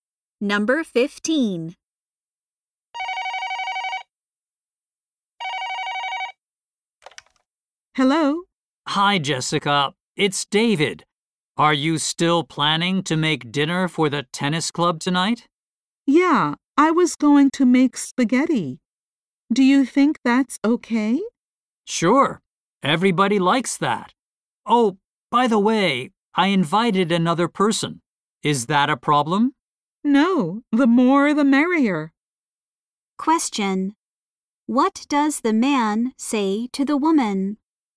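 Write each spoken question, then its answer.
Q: What does the man say to the woman?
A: He invited another person to the dinner.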